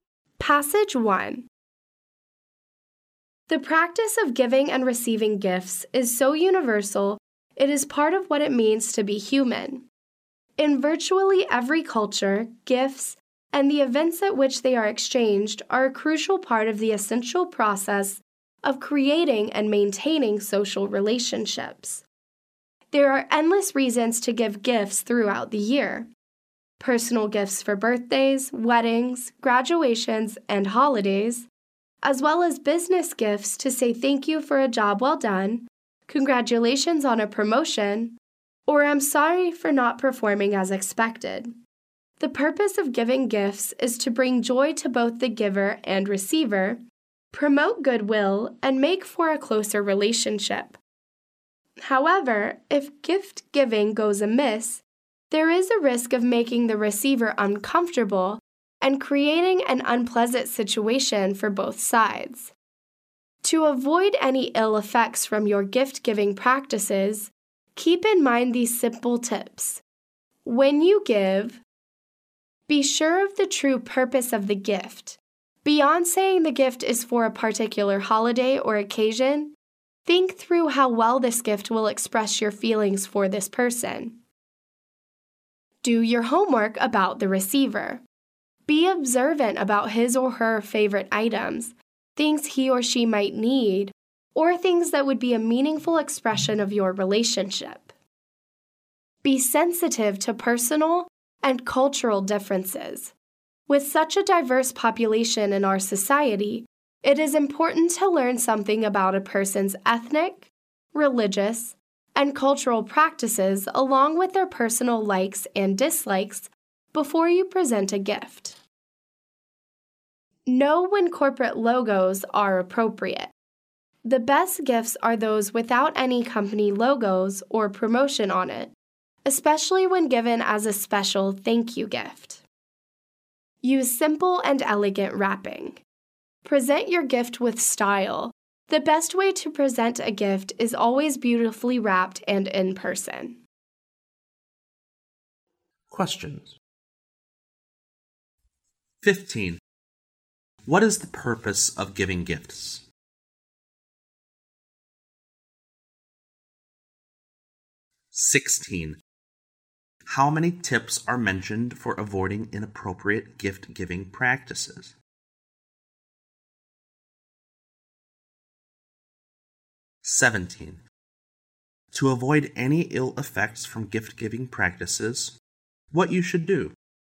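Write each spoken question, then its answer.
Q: What is the purpose of giving gifts?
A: To bring joy to both the giver and receiver, promote goodwill, and make for a closer relationship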